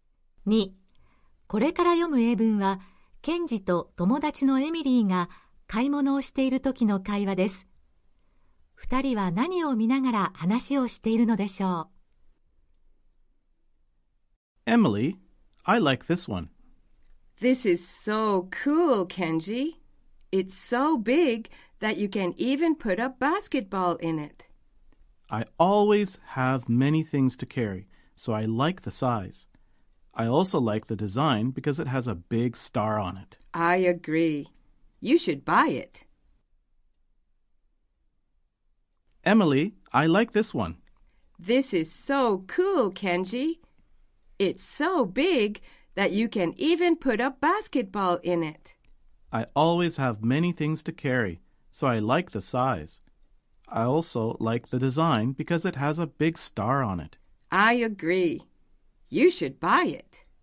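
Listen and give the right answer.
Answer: 大きな星の柄のバッグ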